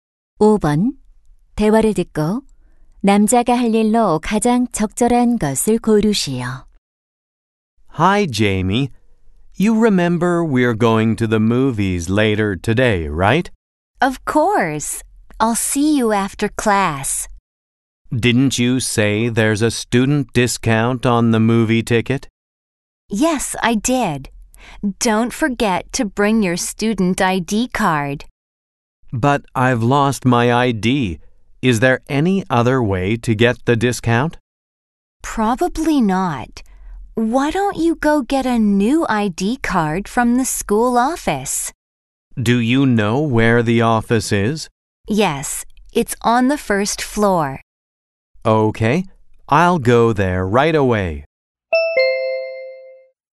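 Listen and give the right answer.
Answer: 학교 사무실에 가서 학생증 재발급받기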